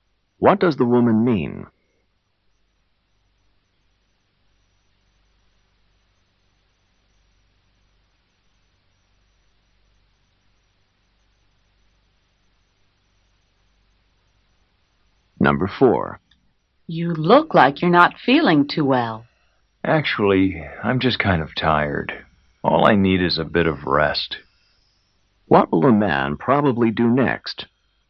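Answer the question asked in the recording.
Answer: Get some rest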